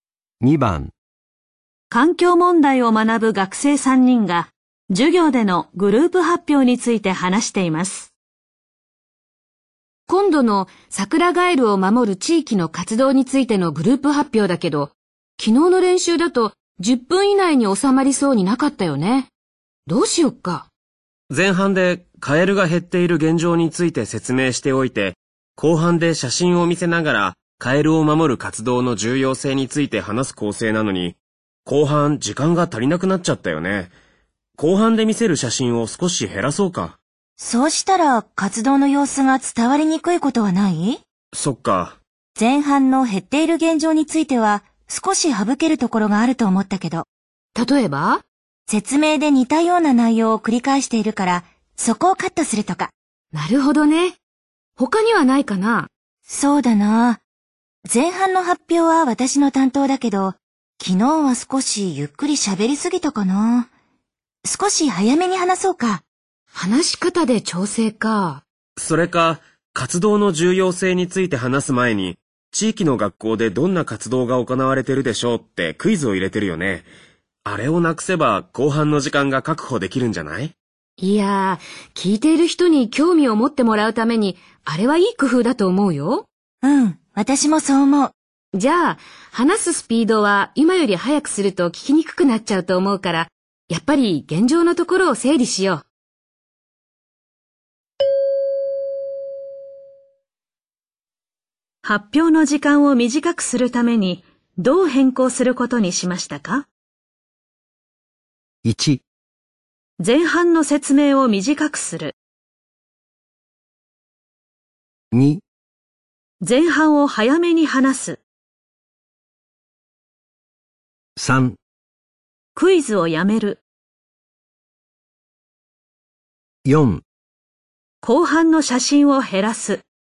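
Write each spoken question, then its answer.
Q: 発表の時間を短くするためにどう変更することにしましたか?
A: 1: 前半の説明を短くする。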